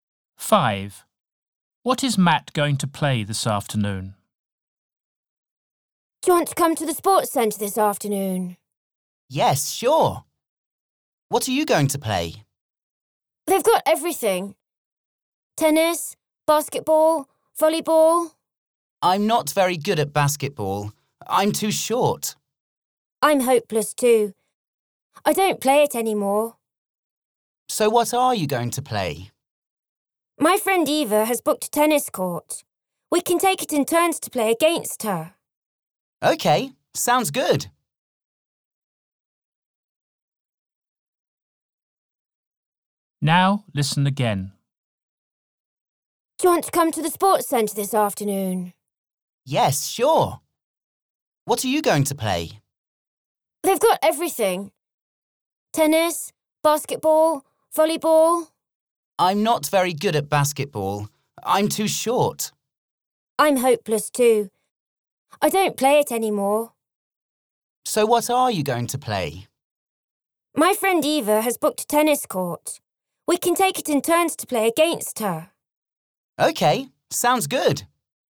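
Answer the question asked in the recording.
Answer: Tennis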